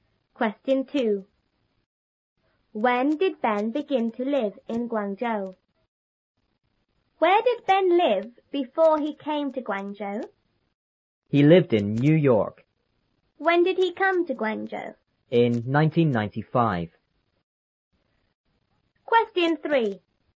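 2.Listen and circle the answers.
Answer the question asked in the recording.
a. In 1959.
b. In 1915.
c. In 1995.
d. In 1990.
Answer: c. In 1995.

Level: 初中英语广州版3B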